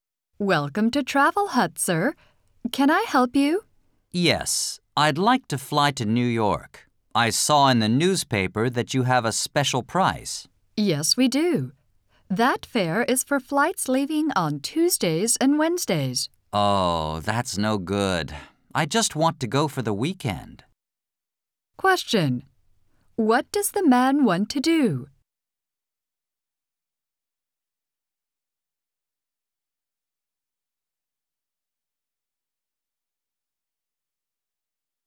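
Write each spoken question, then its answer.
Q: What does the man want to do?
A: Fly to New York for the weekend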